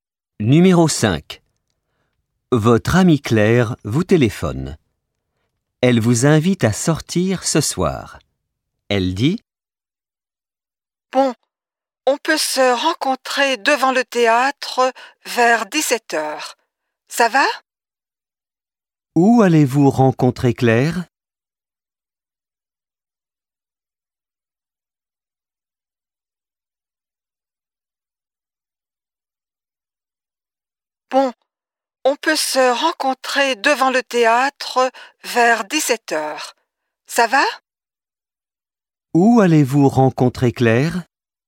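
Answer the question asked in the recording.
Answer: Devant le théâtre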